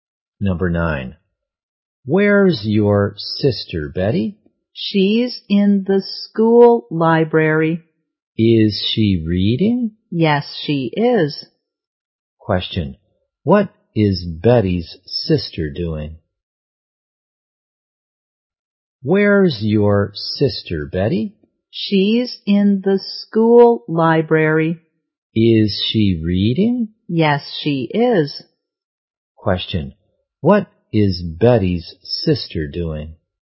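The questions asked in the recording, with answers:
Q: what is Betty's sister doing?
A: She is reading.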